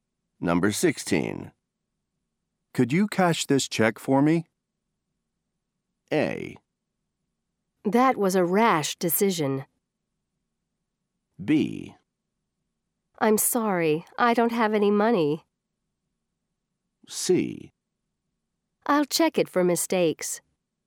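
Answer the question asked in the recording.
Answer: B: I'm sorry, I don't have any money.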